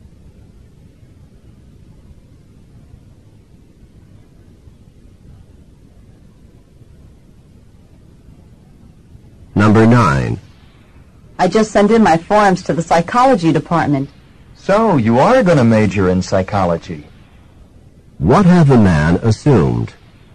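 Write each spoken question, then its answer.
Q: What have the man assumed?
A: That the woman will major in psychology.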